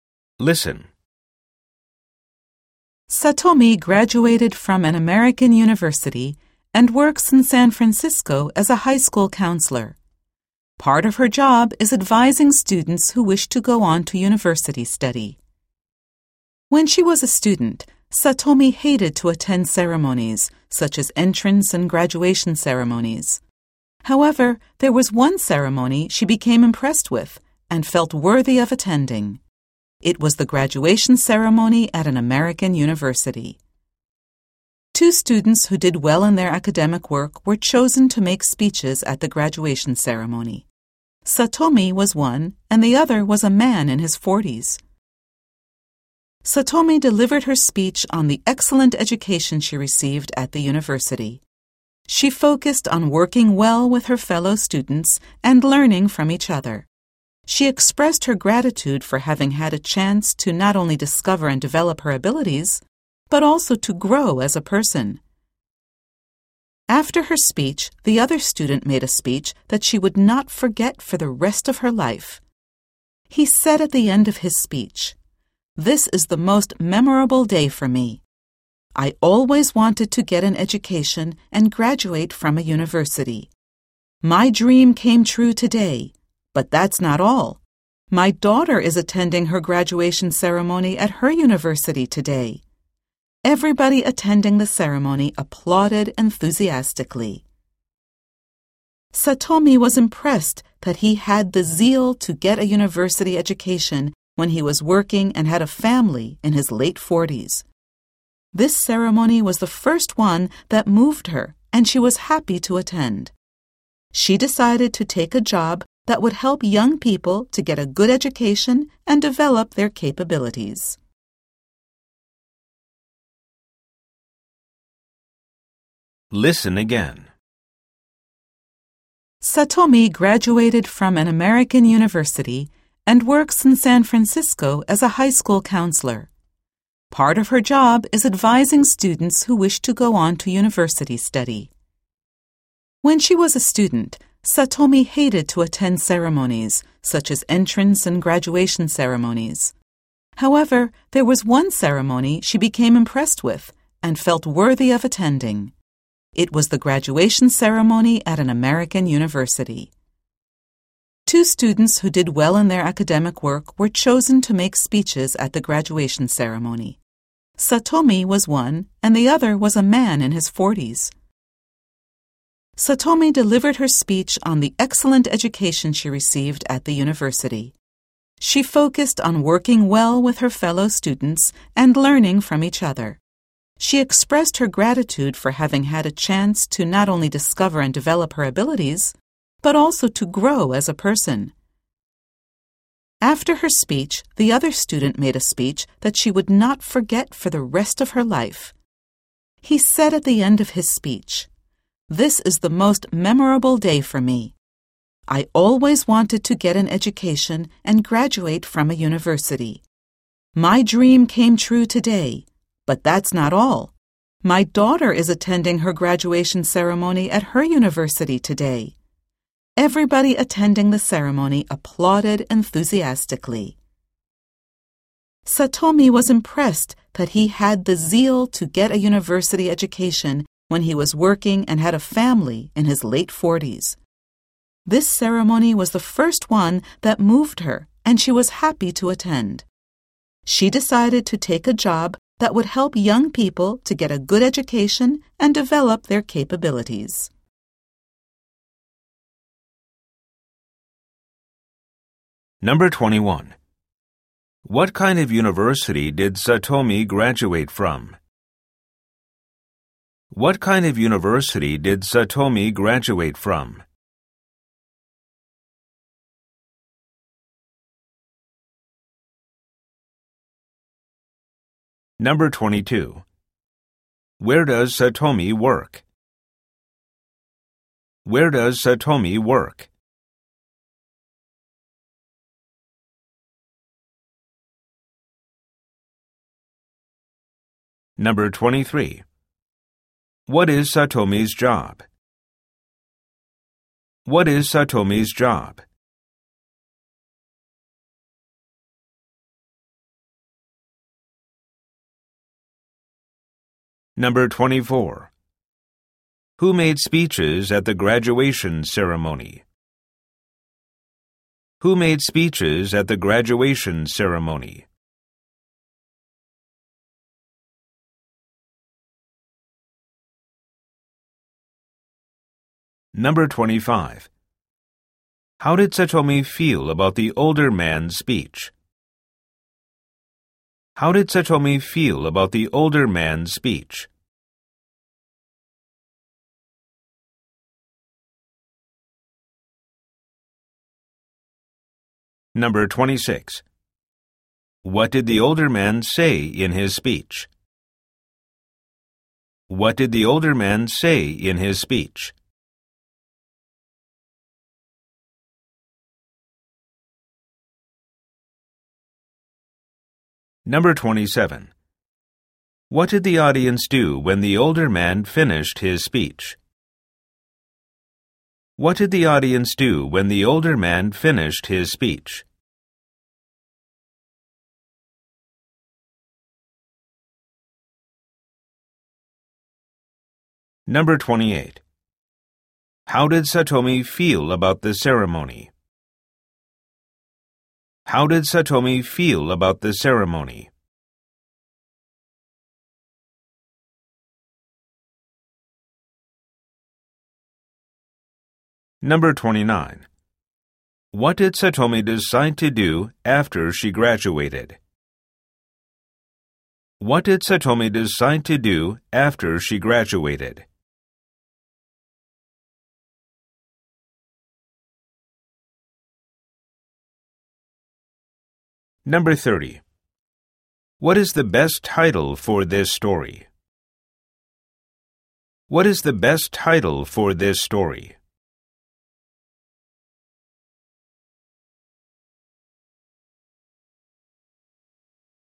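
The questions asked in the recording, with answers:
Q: What kind of university did Satomi graduate from?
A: An American university

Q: Where does Satomi work?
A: In San Francisco

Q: What is Satomi's job?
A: A high school counselor

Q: Who made speeches at the graduation ceremony?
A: Two students who did well academically: Satomi and a man in his 40s

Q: How did Satomi feel about the older man's speech?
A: She was impressed and would never forget it

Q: What did the older man say in his speech?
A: His dream of graduating came true, and his daughter was graduating from her university the same day

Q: What did the audience do when the older man finished his speech?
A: They applauded enthusiastically

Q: How did Satomi feel about the ceremony?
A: It moved her and she was happy to attend

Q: What did Satomi decide to do after she graduated?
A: Take a job helping young people get a good education and develop their capabilities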